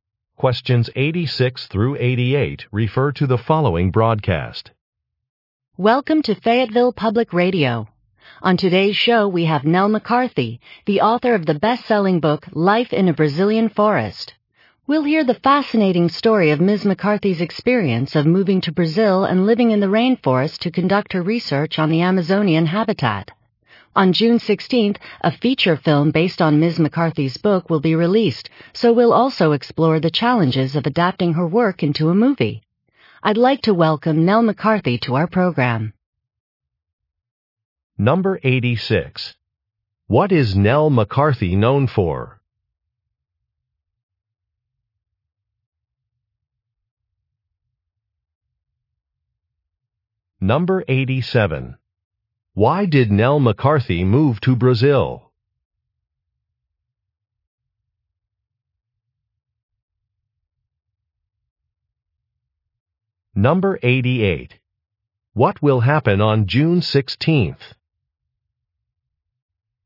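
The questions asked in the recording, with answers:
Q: What is Nell McCarthy known for?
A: Writing a best-selling book

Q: Why did Nell McCarthy move to Brazil?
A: To do research on the Amazonian habitat

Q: What will happen on June 16th?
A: A film based on her book will be released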